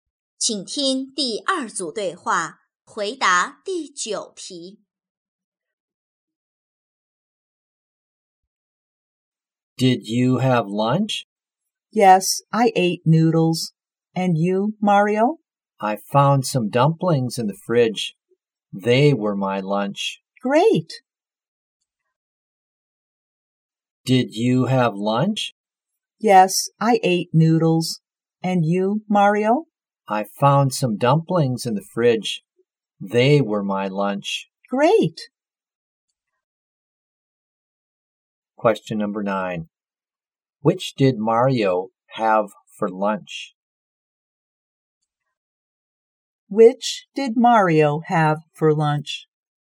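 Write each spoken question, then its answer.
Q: Which did Mario have for lunch?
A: Dumplings.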